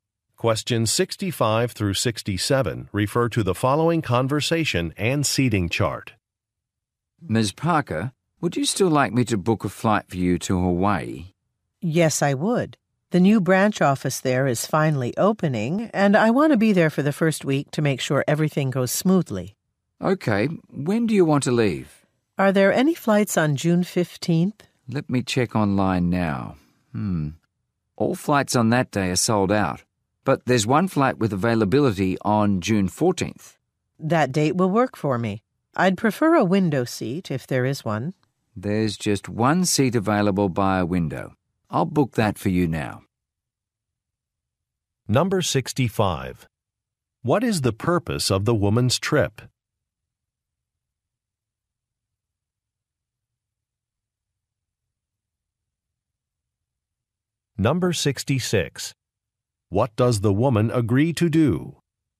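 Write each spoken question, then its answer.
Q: What is the purpose of the woman's trip?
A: To be at a new branch office's opening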